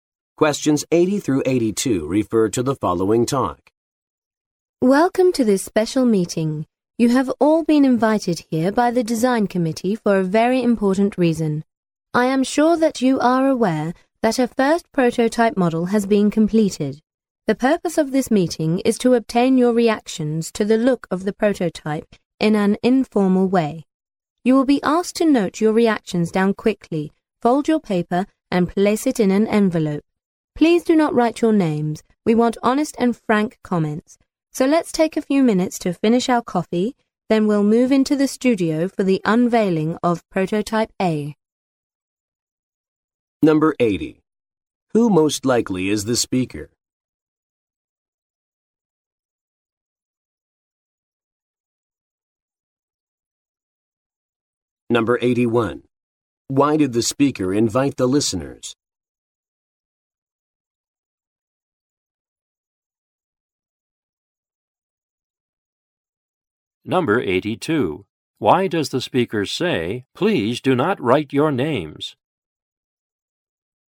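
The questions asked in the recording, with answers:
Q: Why did the speaker invite the listeners?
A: To get their reactions to the look of the prototype

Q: Why does the speaker say, "Please do not write your names"?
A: To get honest and frank comments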